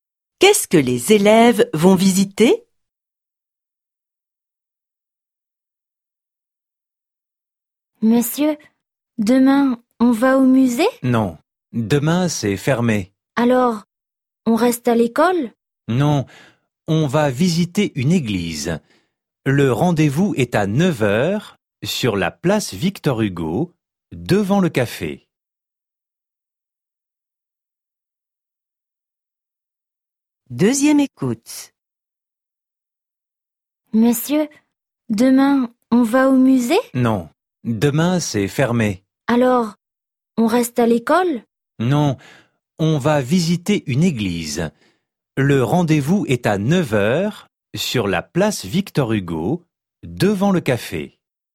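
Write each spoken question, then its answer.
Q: Qu'est-ce que les élèves vont visiter?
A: Une église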